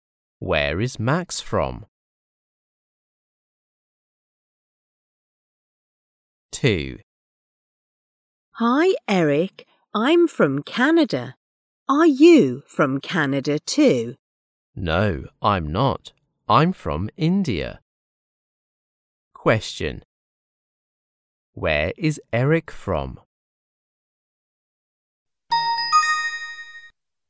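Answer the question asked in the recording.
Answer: India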